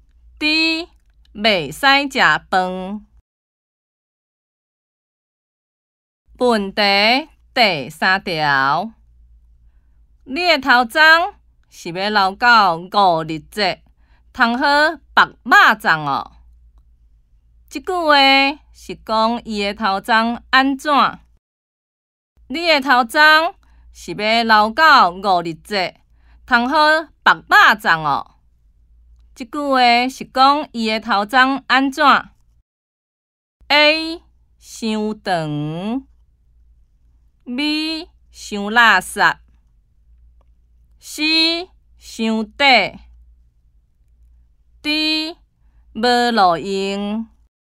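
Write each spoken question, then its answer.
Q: 这句话是讲伊的头鬃安怎?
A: A: 伤长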